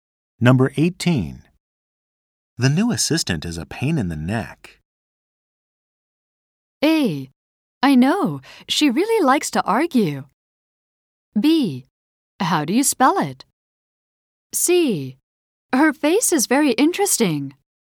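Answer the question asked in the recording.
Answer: A: I know, she really likes to argue.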